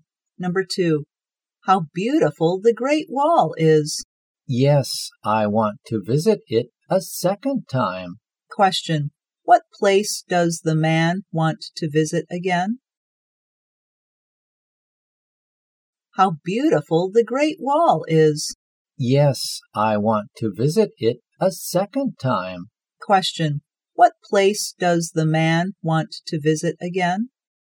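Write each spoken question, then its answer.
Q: what place does the man want to visit again?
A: The Great Wall.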